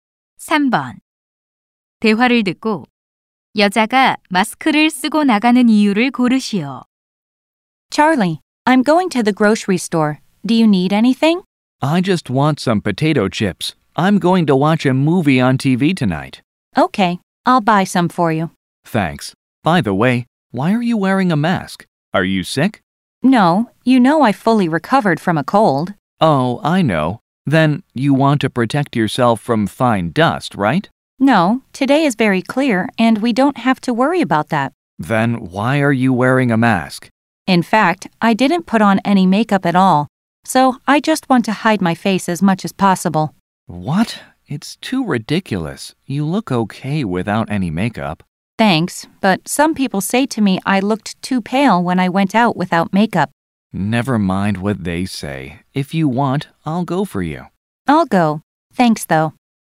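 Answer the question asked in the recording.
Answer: 화장을 하지 않아 얼굴을 가리려고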